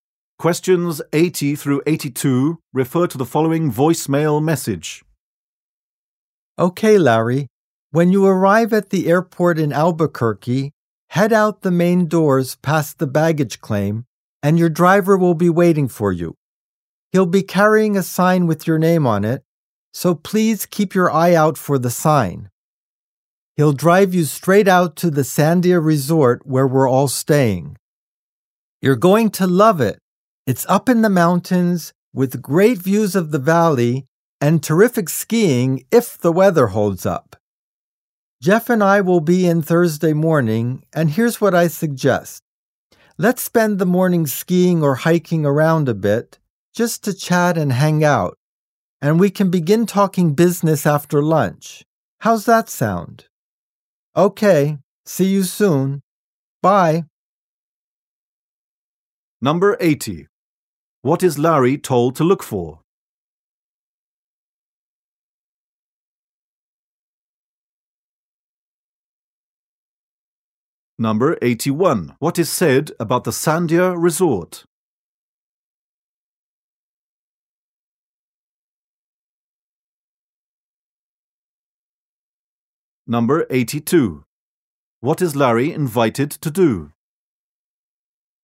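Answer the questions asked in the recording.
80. A driver holding a sign with his name
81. It is in the mountains with great views and skiing
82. Go skiing or hiking in the morning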